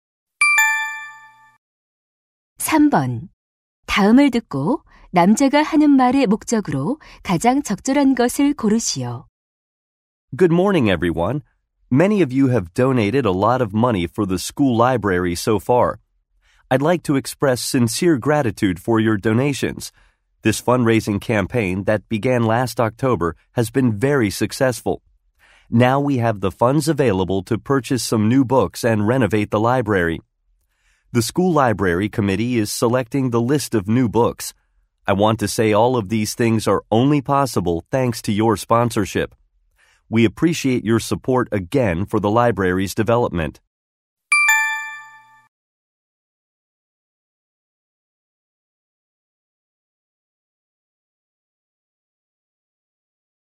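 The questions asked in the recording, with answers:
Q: 다음을 듣고 남자가 하는 말의 목적으로 가장 적절한 것을 고르시오.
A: 학교 도서관 기부에 감사하려고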